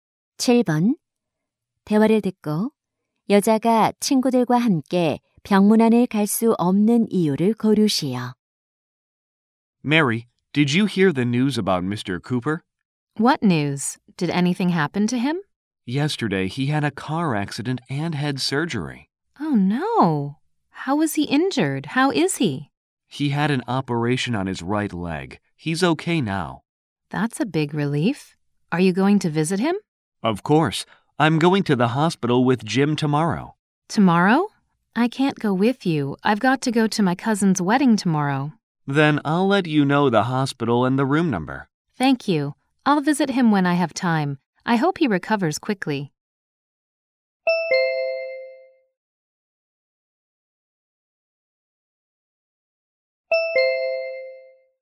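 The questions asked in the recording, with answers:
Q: 대화를 듣고 여자가 친구들과 함께 병문안을 갈 수 없는 이유를 고르시오.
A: 사촌의 결혼식에 가야 해서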